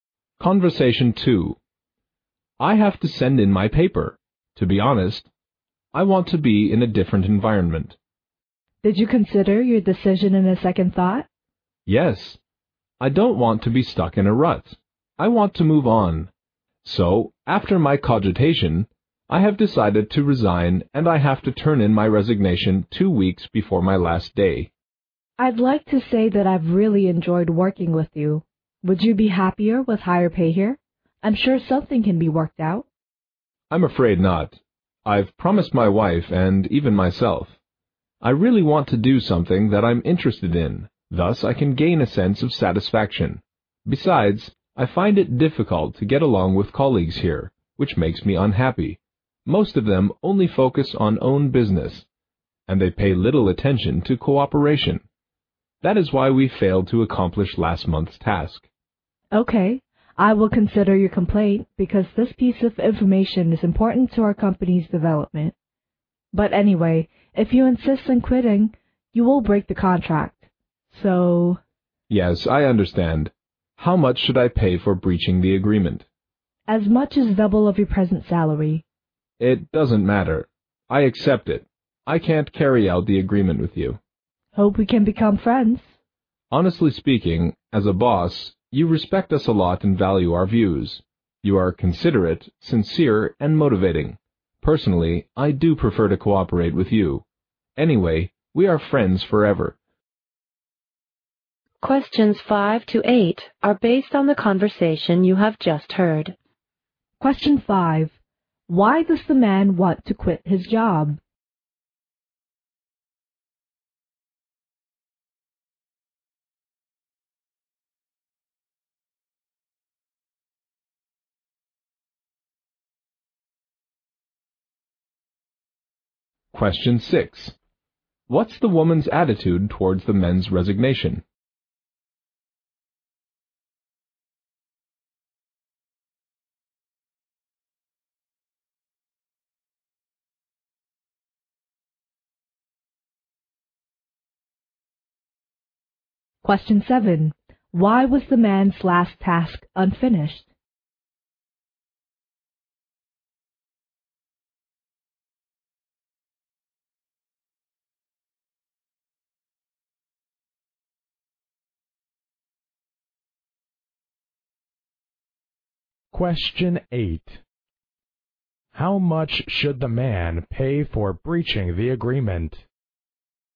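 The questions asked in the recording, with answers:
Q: Why does the man want to quit his job?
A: He wants a different environment and to do something he is interested in

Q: Why was the man's last task unfinished?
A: Colleagues focused on their own business and paid little attention to cooperation

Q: How much should the man pay for breaching the agreement?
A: Double his present salary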